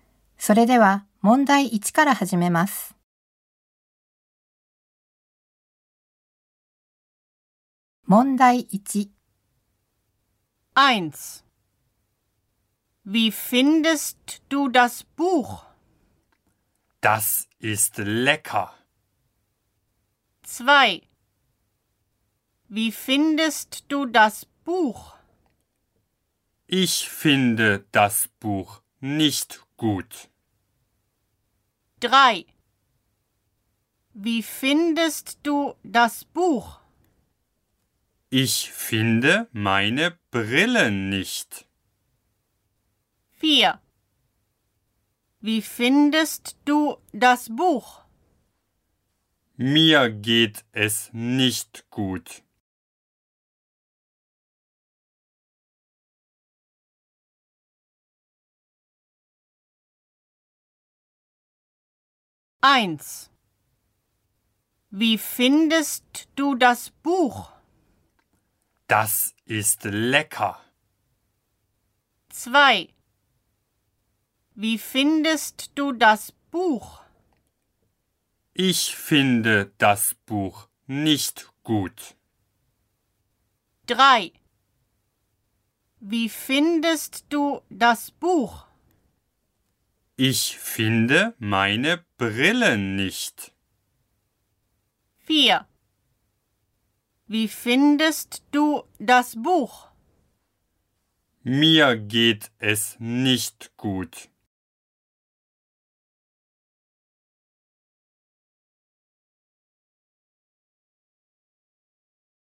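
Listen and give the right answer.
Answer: 2: Ich finde das Buch nicht gut.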